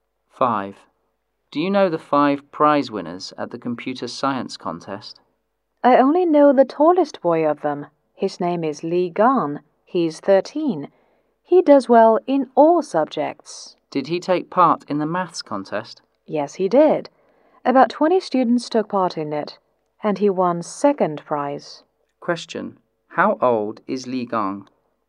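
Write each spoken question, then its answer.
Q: How old is Lee Gan?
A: 13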